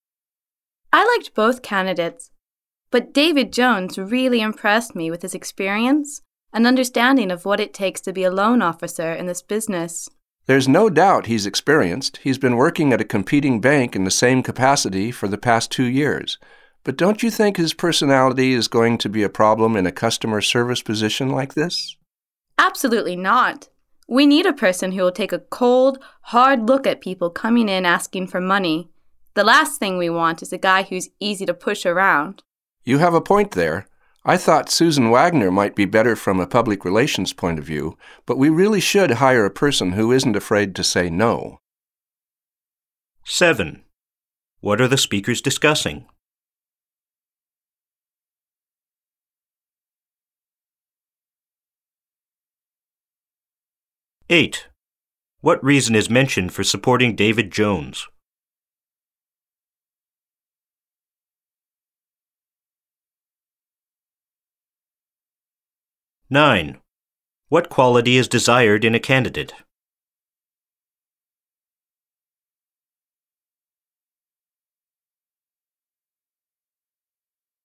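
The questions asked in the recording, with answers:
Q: What are the speakers discussing?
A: Which candidate to hire as a loan officer

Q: What reason is mentioned for supporting David Jones?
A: His experience as a loan officer at a competing bank

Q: What quality is desired in a candidate?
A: Not being afraid to say no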